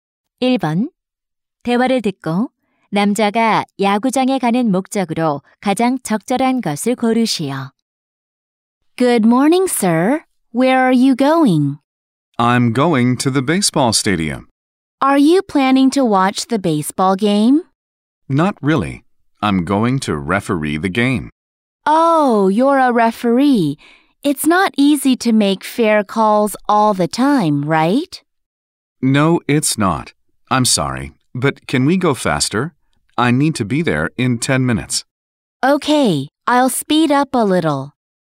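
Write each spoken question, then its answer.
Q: 대화를 듣고 남자가 야구장에 가는 목적으로 가장 적절한 것을 고르시오.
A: 경기 심판을 보기 위해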